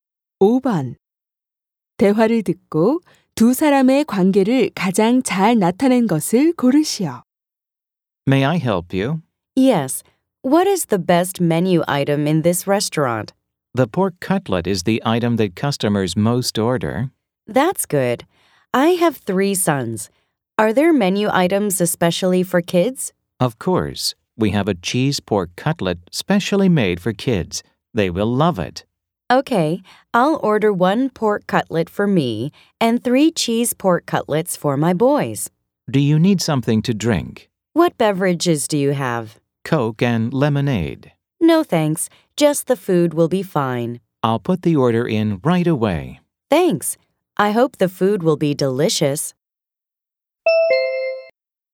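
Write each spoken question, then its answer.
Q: 대화를 듣고 두 사람의 관계를 가장 잘 나타낸 것을 고르시오.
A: 식당 종업원 - 손님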